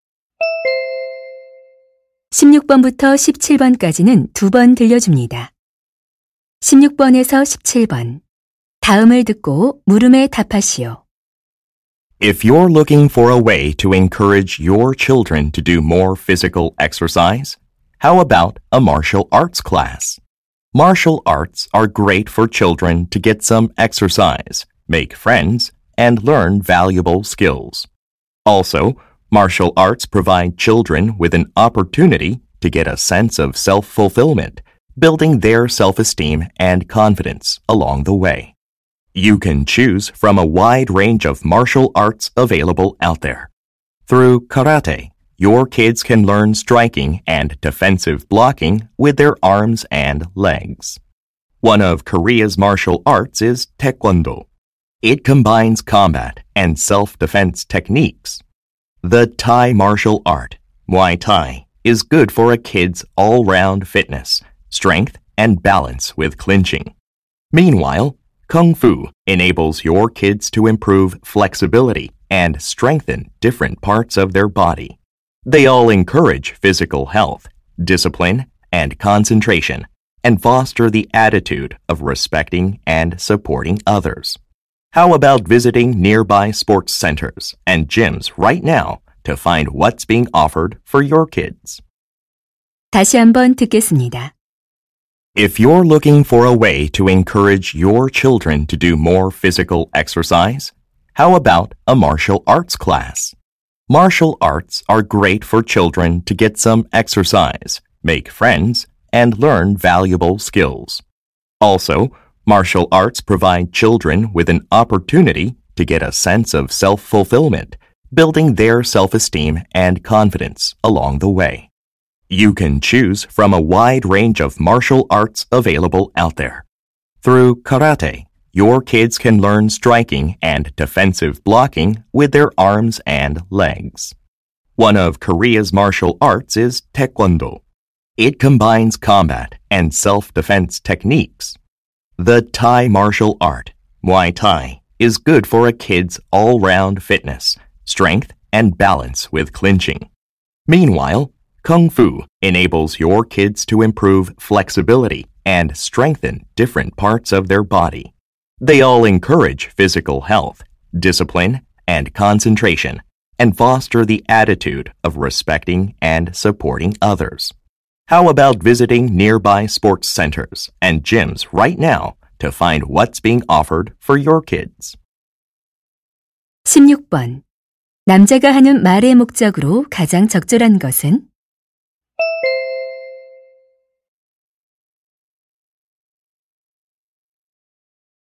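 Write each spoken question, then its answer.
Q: 남자가 하는 말의 목적으로 가장 적절한 것은?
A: 아이들에게 무술 수업을 권장하려고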